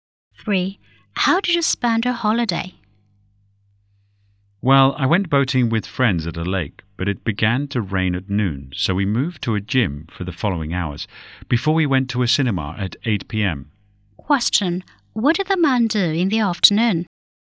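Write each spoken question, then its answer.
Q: What did the man do in the afternoon?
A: He went to a gym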